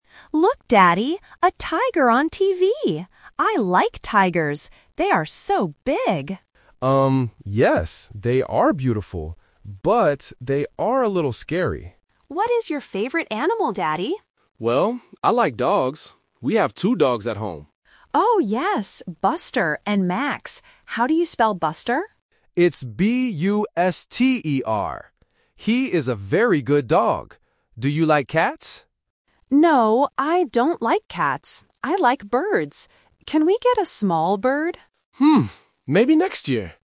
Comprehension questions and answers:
Listen to the conversation between a father and his daughter. Choose the correct answer (A, B, or C) for each question.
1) What animal does the girl see on TV?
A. A bird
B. A tiger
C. A bear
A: B. A tiger

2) What is the name of the dog the father spells?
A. Max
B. Buster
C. Bella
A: B. Buster

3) What animal does the girl NOT like?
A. Cats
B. Tigers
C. Dogs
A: A. Cats

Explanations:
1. The girl says, "A tiger on TV! I like tigers." Option A (A bird) is the trap because she mentions birds at the end, but they are not on TV. Option C (A bear) is not mentioned.
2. The father spells the name of the dog: "B-U-S-T-E-R". Option A (Max) is the trap because Max is the other dog, but the father does not spell his name. Option C (Bella) is not mentioned.
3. The father asks, "Do you like cats?" and the girl answers, "No, I don't like cats." Option B (Tigers) is the trap because it is mentioned, but she likes tigers. Option C (Dogs) is mentioned because the father likes dogs.

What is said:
Daughter: Look, Daddy! A tiger on TV! I like tigers. They are so big.
Father: Um, yes, they are beautiful. But they are a little scary.
Daughter: What is your favorite animal, Daddy?
Father: Well, I like dogs. We have two dogs at home.
Daughter: Oh, yes! Buster and Max. How do you spell Buster?
Father: It's B-U-S-T-E-R. He is a very good dog. Do you like cats?
Daughter: No, I don't like cats. I like birds. Can we get a small bird?

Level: A1

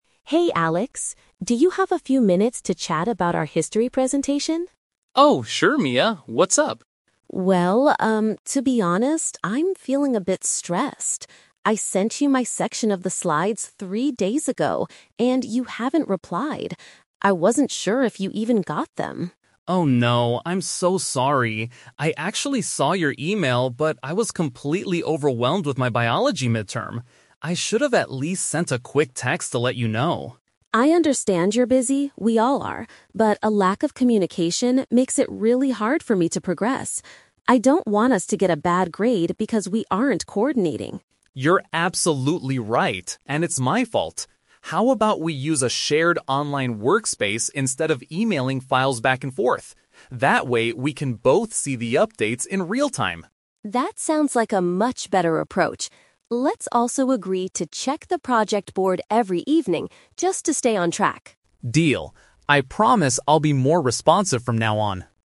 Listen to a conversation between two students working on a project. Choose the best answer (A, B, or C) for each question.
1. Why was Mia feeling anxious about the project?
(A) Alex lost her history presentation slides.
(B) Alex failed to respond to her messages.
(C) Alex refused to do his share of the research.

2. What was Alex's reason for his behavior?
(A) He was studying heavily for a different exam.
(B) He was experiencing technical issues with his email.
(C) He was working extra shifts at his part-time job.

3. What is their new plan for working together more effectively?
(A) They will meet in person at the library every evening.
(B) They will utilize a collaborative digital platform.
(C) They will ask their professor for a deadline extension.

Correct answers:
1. (B) Alex failed to respond to her messages.
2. (A) He was studying heavily for a different exam.
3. (B) They will utilize a collaborative digital platform.

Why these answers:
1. Mia states that she sent her section of the slides three days ago, and Alex "hasn't replied." Paraphrasing: hasn't replied = failed to respond. Trap: Option A is wrong because although she sent the "history presentation slides", Alex didn't lose them (he saw the email). Option C is plausible in group work but was not mentioned in the audio.
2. Alex explains that he was "completely overwhelmed with my biology mid-term." A mid-term is an exam for a different subject. Trap: Option B is a trap. The audio mentions his "email," but he saw it fine; there were no technical issues. Option C is a common excuse for students but is not mentioned here.
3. Alex suggests using a "shared online workspace instead of emailing files." Utilizing a collaborative digital platform is a direct paraphrase of this idea. Trap: Option A is a distractor. Mia suggests checking the project board "every evening," but she does not mean meeting in person. Option C is not mentioned at all.

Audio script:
Mia: Hey Alex, do you have a few minutes to chat about our history presentation?
Alex: Oh, sure Mia. What's up?
Mia: Well, um, to be honest, I'm feeling a bit stressed. I sent you my section of the slides three days ago, and you haven't replied. I wasn't sure if you even got them.
Alex: Oh no, I'm so sorry. I actually saw your email, but I was completely overwhelmed with my biology mid-term. I should have at least sent a quick text to let you know.
Mia: I understand you're busy, we all are. But a lack of communication makes it really hard for me to progress. I don't want us to get a bad grade because we aren't coordinating.
Alex: You're absolutely right, and it's my fault. How about we use a shared online workspace instead of emailing files back and forth? That way, we can both see the updates in real-time.
Mia: That sounds like a much better approach. Let's also agree to check the project board every evening, just to stay on track.

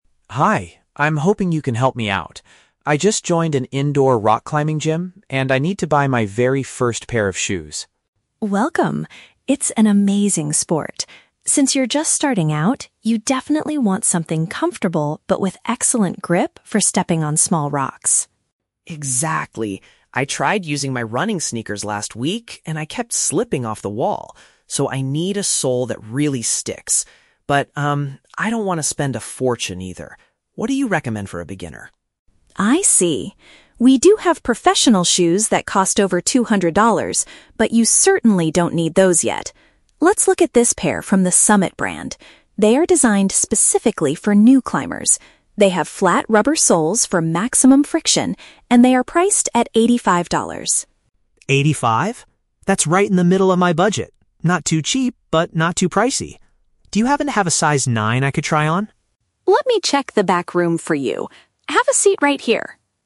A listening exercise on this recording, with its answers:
Listen to the conversation between a customer and a sales assistant in a sports shop. Choose the correct answer (A, B, or C) for each question.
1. Why does the customer need to buy new shoes?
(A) His current athletic footwear does not provide enough traction.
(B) He wants to participate in an outdoor running competition.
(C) His old climbing shoes are completely broken and torn.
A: (A) His current athletic footwear does not provide enough traction.

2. What is the customer's requirement regarding the price?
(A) He is willing to pay over two hundred dollars for high quality.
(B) He wants to buy the cheapest option available in the store.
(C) He is looking for something that is reasonably priced.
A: (C) He is looking for something that is reasonably priced.

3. What is a special feature of the shoes suggested by the assistant?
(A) They are manufactured by the most famous professional brand.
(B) Their bottom material helps the climber hold onto the wall securely.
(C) They come with a free training session for new gym members.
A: (B) Their bottom material helps the climber hold onto the wall securely.

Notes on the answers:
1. The customer says, "I tried using my running sneakers last week, and I kept slipping off the wall." "Athletic footwear" is a paraphrase for running sneakers, and "does not provide enough traction" means he kept slipping. Why the traps are wrong: Option B is a trap using the word "running" from the audio, but he is doing rock climbing, not a running competition. Option C is a plausible reason to buy shoes, but he explicitly says he is looking for his "very first pair," meaning he doesn't have old climbing shoes.
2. The customer says, "I don't want to spend a fortune," and when hearing the $85 price, he says, "That's right in the middle of my budget. Not too cheap, but not too pricey." This means he wants something "reasonably priced". Why the traps are wrong: Option A is a trap using the "two hundred dollars" mentioned by the assistant, but the assistant says he doesn't need those. Option B is a trap because he explicitly states he does not want something "too cheap."
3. The assistant mentions the shoes have "flat rubber soles for maximum friction." "Bottom material" is a synonym for soles, and providing friction means it "helps the climber hold onto the wall securely." Why the traps are wrong: Option A is a trap using the word "professional" from the audio, but the shoes being rec

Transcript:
Customer: Hi, I'm hoping you can help me out. I just joined an indoor rock climbing gym, and I need to buy my very first pair of shoes.
Assistant: Welcome! It's an amazing sport. Since you're just starting out, you definitely want something comfortable but with excellent grip for stepping on small rocks.
Customer: Exactly. I tried using my running sneakers last week, and I kept slipping off the wall. So, I need a sole that really sticks. I don't want to spend a fortune either. What do you recommend for a beginner?
Assistant: I see. We do have professional shoes that cost over two hundred dollars, but you certainly don't need those yet. Let's look at this pair from the 'Summit' brand. They are designed specifically for new climbers. They have flat rubber soles for maximum friction, and they are priced at eighty-five dollars.
That's right in the middle of my budget. Not too cheap, but not too pricey. Do you happen to have a size 9 I could try on?

